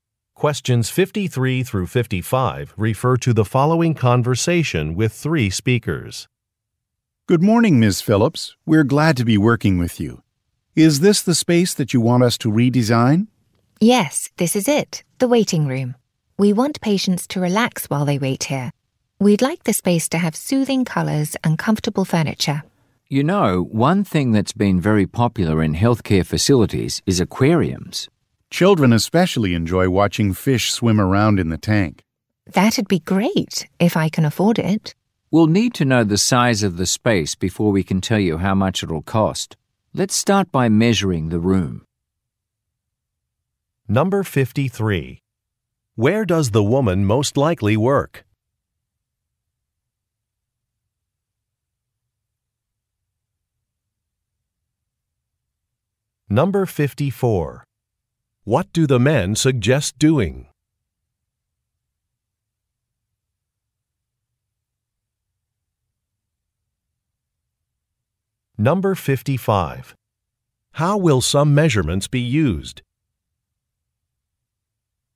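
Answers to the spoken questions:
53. At a healthcare facility
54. Installing an aquarium
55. To estimate the cost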